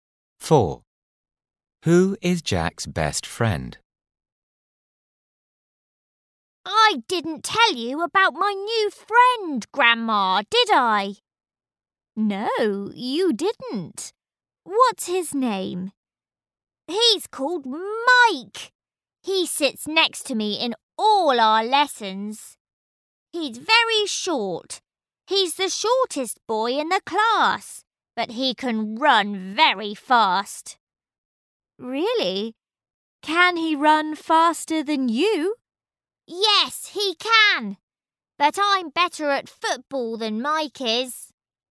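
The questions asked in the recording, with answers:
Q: Who is Jack's best friend?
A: Mike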